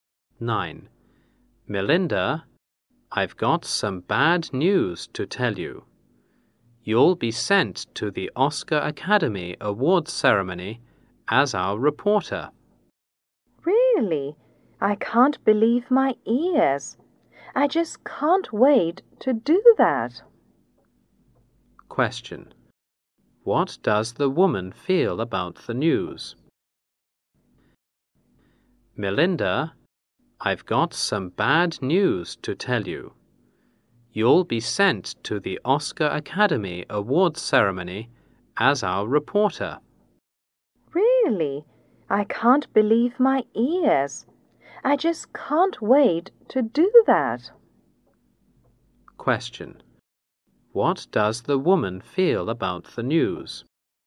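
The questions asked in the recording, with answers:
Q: What does the woman feel about the news?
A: Excited and happy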